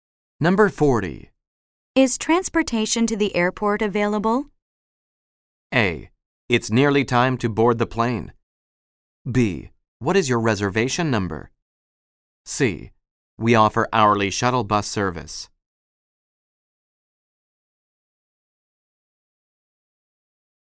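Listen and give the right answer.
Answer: C: We offer hourly shuttle bus service.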